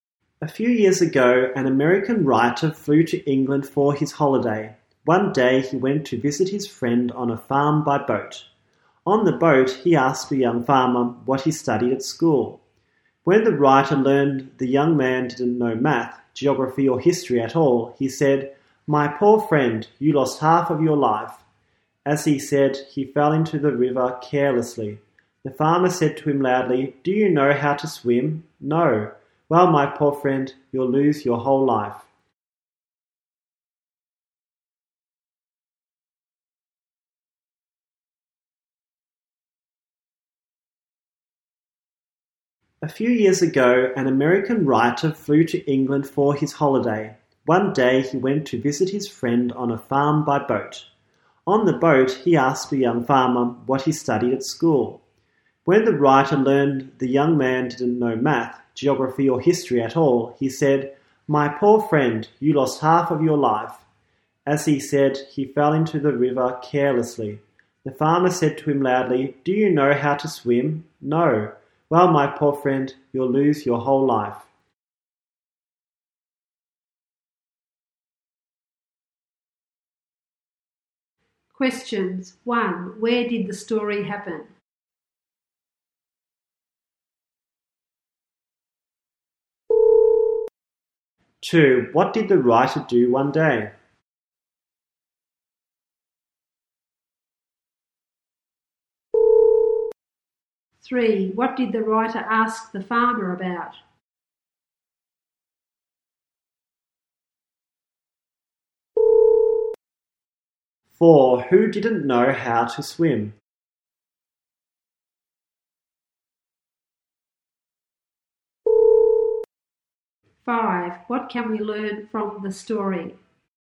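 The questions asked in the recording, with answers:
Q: What did the writer do one day?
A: He went to visit his friend on a farm by boat

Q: What did the writer ask the farmer about?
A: What he studied at school

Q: Who didn't know how to swim?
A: The writer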